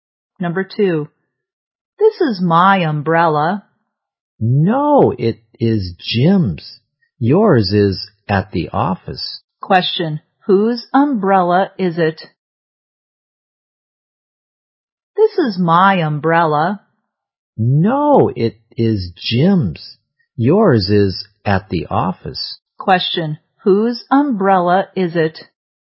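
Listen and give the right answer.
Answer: Jim's.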